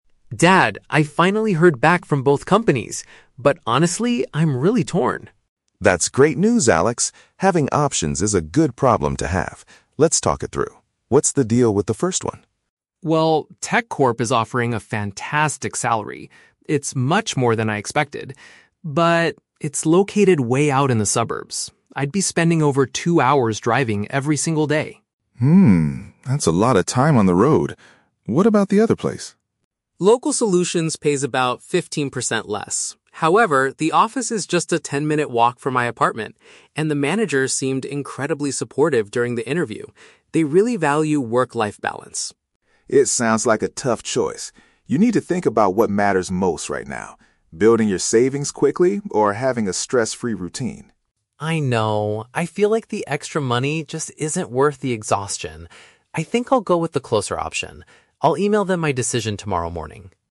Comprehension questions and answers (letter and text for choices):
Listen to the conversation between a father and his son. Choose the correct answer (A, B, or C) for each question.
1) What is the main drawback of the first job offer?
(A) The financial compensation is disappointing.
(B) It requires a significant amount of travel time.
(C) The working hours are extremely inflexible.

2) Why does Alex like the second company?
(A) They give their staff a fifteen percent annual bonus.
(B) They prioritize employee well-being and personal time.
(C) They offer excellent training programs for beginners.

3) What conclusion does Alex reach at the end of the conversation?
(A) He will choose the job that is a short distance away.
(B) He will accept the position that helps build his savings faster.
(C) He will ask both managers for a few more days to decide.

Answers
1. (B) It requires a significant amount of travel time.
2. (B) They prioritize employee well-being and personal time.
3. (A) He will choose the job that is a short distance away.

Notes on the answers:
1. Alex mentions that the first company is "way out in the suburbs" and he would spend "over two hours driving every single day". This is perfectly paraphrased as "a significant amount of travel time". Option (A) is The Trap: Salary is mentioned, but Alex says it is "fantastic" and "much more than I expected", not disappointing. Option (C) is plausible in a job context but never mentioned.
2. Alex states that the second company's manager is supportive and they "value work-life balance". Option (B) uses synonyms to express this exact idea. Option (A) is The Trap: The number "fifteen percent" is mentioned in the audio, but it refers to a lower salary (pays fifteen percent less), not a bonus. Option (C) is not mentioned.
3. Alex decides that the extra money isn't worth the exhaustion and says, "I'll go with the closer option." Option (A) paraphrases this decision. Option (B) is The Trap: The dad mentions "building your savings quickly" as one of the factors to consider, but Alex explicitly rejects this path. Option (C) is not mentioned.

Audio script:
Alex: Dad, I finally heard back from both companies! But honestly, I'm really torn.
Dad: That's great news, Alex! Having options is a good problem to have. Let's talk it through. What's the deal with the first one?
Alex: Well, TechCorp is offering a fantastic salary. It's much more than I expected. But... it's located way out in the suburbs. I'd be spending over two hours driving every single day.
Dad: Hmm, that's a lot of time on the road. What about the other place?
Alex: Local Solutions pays about fifteen percent less. However, the office is just a ten-minute walk from my apartment, and the manager seemed incredibly supportive during the interview. They really value work-life balance.
Dad: It sounds like a tough choice. You need to think about what matters most right now: building your savings quickly or having a stress-free routine.
Alex: I know. I feel like the extra money just isn't worth the exhaustion. I think I'll go with the closer option. I'll email them my decision tomorrow morning.